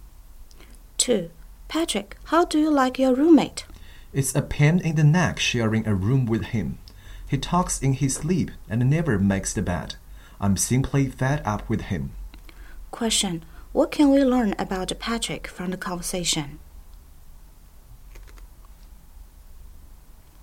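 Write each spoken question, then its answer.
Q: What can we learn about Patrick from the conversation?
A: He is fed up with his roommate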